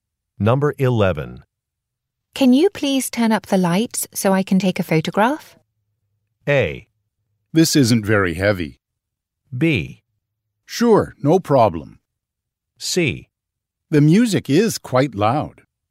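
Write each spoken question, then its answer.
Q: Can you please turn up the lights so I can take a photograph?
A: B: Sure, no problem.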